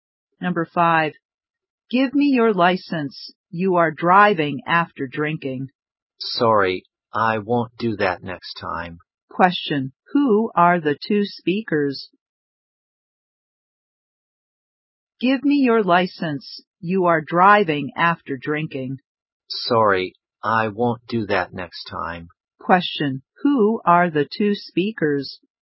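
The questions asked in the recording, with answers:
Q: Question. Who are the two speakers?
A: A policeman and a driver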